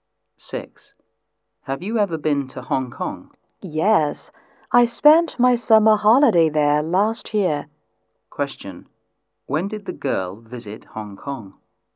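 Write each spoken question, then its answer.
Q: When did the girl visit Hong Kong?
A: Last summer holiday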